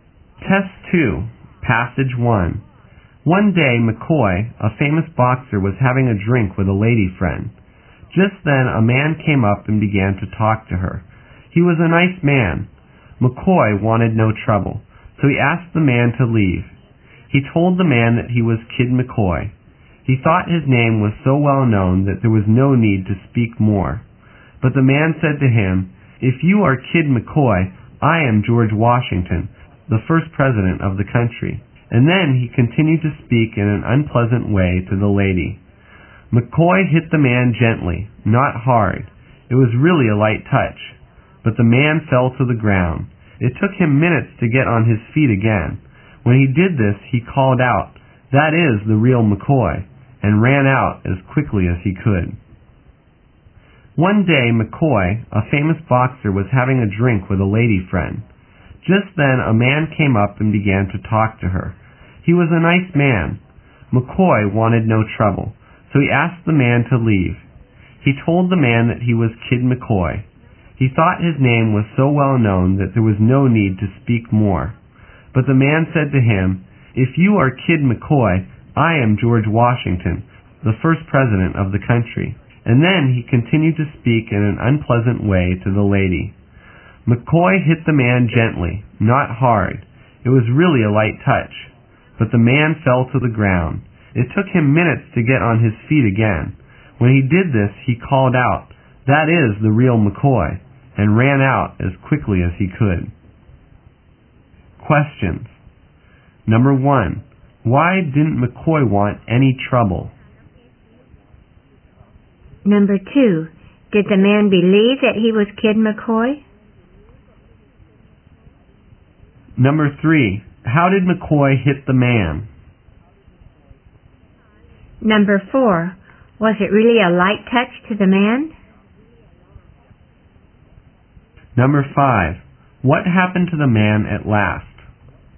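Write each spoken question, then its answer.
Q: Did the man believe that he was Kid McCoy?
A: No

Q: How did McCoy hit the man?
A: Gently, not hard

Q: Was it really a light touch to the man?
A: No, he fell to the ground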